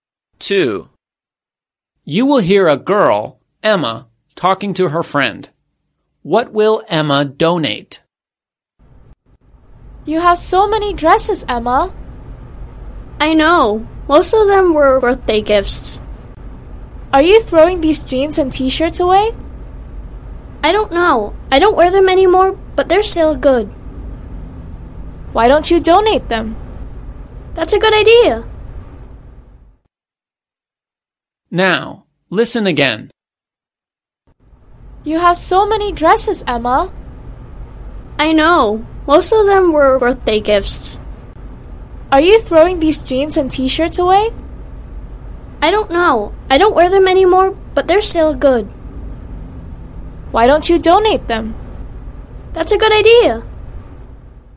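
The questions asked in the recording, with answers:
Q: What will Emma donate?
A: Her jeans and t-shirts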